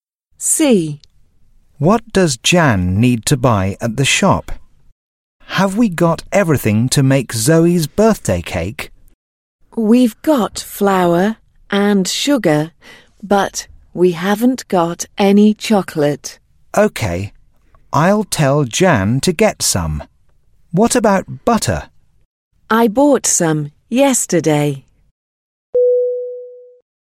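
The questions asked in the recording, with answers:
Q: What does Jan need to buy at the shop?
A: Chocolate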